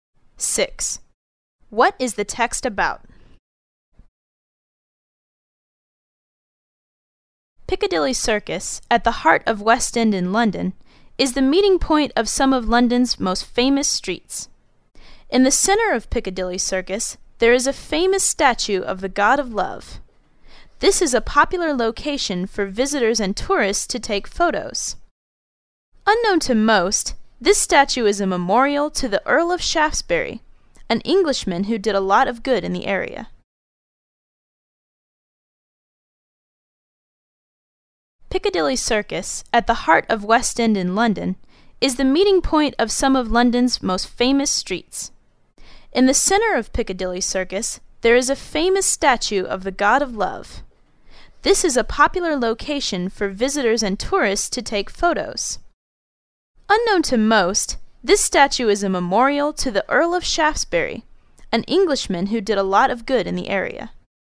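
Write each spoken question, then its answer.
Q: What is the text about?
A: The statue in the center of Piccadilly Circus in London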